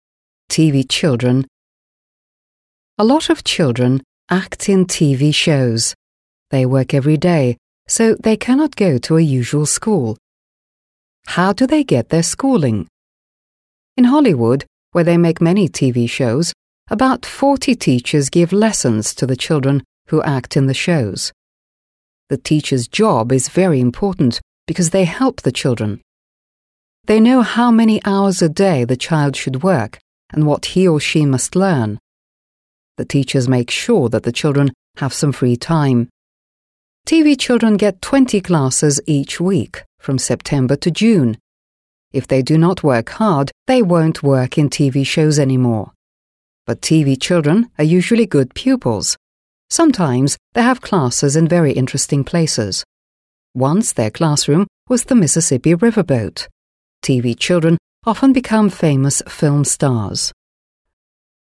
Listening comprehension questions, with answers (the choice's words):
Listen to the text «TV Children» and complete the sentences below.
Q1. TV children are children who ... .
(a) watch a lot of TV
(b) take part in TV shows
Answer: take part in TV shows

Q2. TV children work ... .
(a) with the help of teachers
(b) without anybody's help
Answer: with the help of teachers

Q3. TV children have ... classes a week.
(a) twelve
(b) twenty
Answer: twenty

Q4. TV children have no classes in ... .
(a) July and August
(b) August and September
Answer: July and August

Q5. They can't act in TV shows if they ... .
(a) don't come from Hollywood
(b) are not hard-working pupils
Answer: are not hard-working pupils

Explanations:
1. В тексте говорится, что TV дети — это те дети, которые работают в телевизионных шоу, а не те, кто смотрит много телевизора. Поэтому правильный ответ — b).
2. В тексте указано, что дети в телевизионных шоу учат уроки с помощью учителей. Учителя проводят уроки для этих детей, следят за их временем и тем, что они учат. Ответ a) правильный, так как дети работают именно с учителями.
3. В тексте прямо указано, что TV дети получают двадцать уроков в неделю с сентября по июнь. Это точная информация, поэтому правильный ответ — b).
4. В тексте сказано, что дети, участвующие в телевизионных шоу, учат уроки с сентября по июнь, что означает, что у них нет занятий в июле и августе. Следовательно, правильный ответ — a).
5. В тексте говорится, что если дети не будут усердно работать, они не смогут продолжать играть в телевизионных шоу. Это подтверждает правильность ответа b). Ответ a) не подходит, так как место проживания (например, Голливуд) не является решающим фактором для участия в шоу.

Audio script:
A lot of children play in TV shows. They work every day, so they cannot go to a usual school. How do they get their schooling?
In Hollywood, where they make many TV shows, about forty teachers give lessons to the children who play in the shows. The teachers' job is very important because they help the children. They know how many hours a day the child should work and what he or she must learn. The teachers make sure that the children have some free time. TV children get twenty classes each week, from September to June. If they do not work hard, they won't work in TV shows any more. But TV children are usually good pupils. Sometimes they have classes in very interesting places. Once their classroom was the Mississippi riverboat.
TV children often become famous film stars.

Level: 7 класс